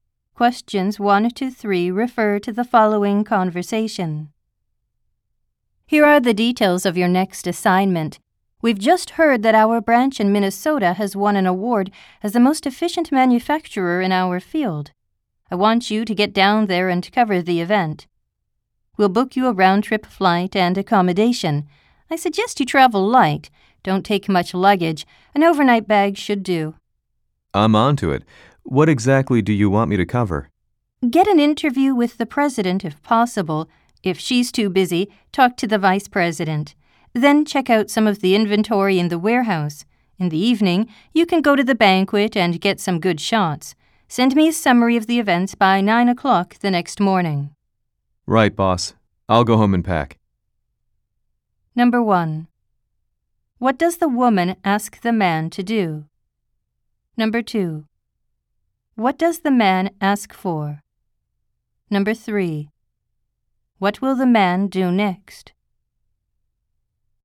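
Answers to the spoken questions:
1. Go to Minnesota and cover the award event at their branch
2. Details of what exactly he should cover
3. Go home and pack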